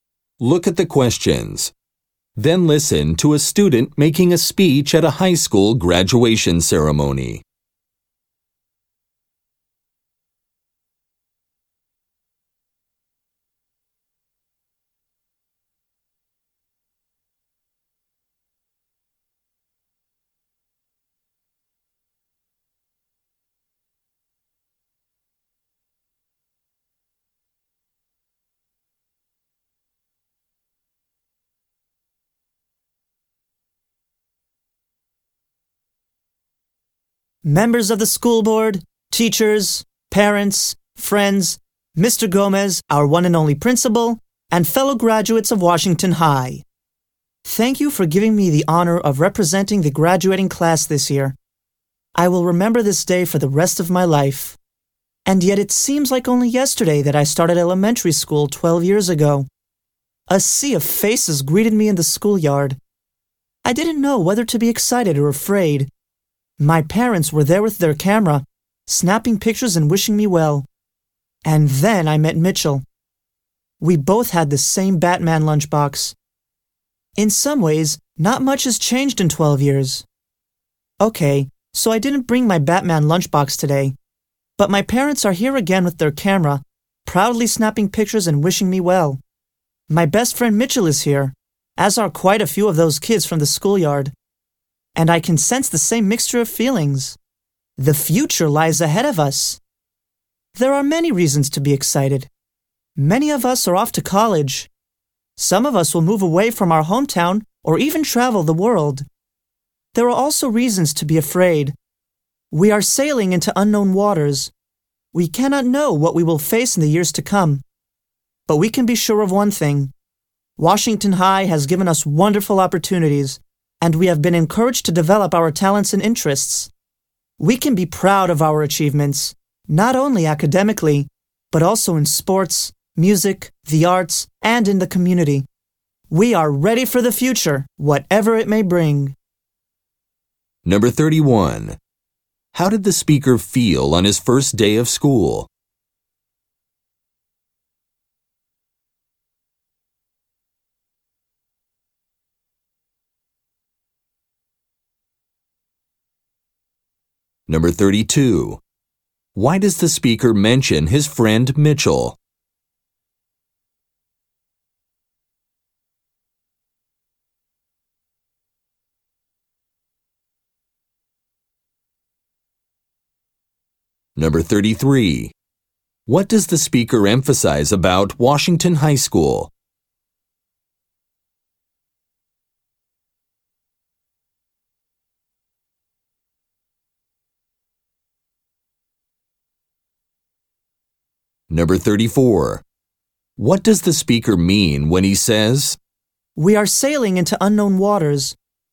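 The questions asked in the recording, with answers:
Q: How did the speaker feel on his first day of school?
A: Unsure whether to be excited or afraid

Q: What does the speaker emphasize about Washington High School?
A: It gave students wonderful opportunities and prepared them for the future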